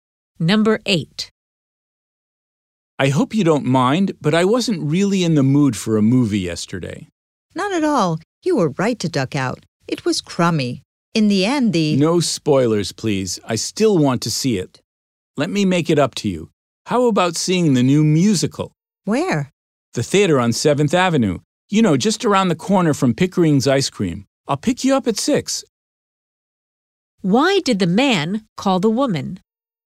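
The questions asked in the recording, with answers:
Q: Why did the man call the woman?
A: To invite her to a musical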